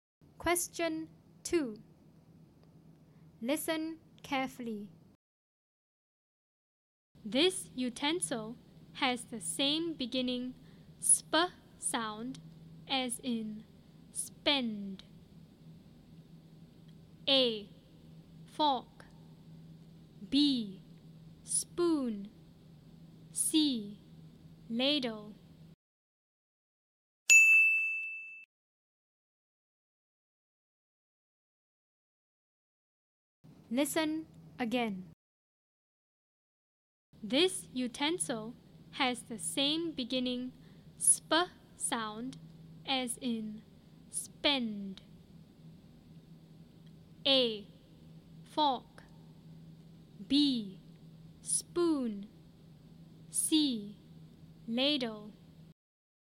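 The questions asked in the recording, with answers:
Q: This utensil has the same beginning sp sound as in spend.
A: B: Spoon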